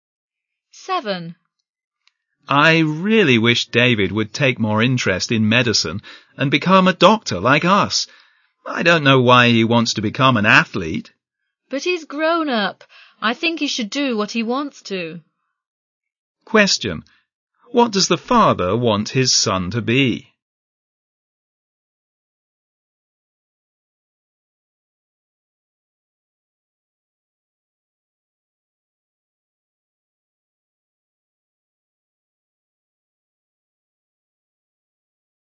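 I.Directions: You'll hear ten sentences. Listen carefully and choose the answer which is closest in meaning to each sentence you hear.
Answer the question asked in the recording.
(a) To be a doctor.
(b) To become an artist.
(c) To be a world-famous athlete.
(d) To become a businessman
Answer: (a) To be a doctor.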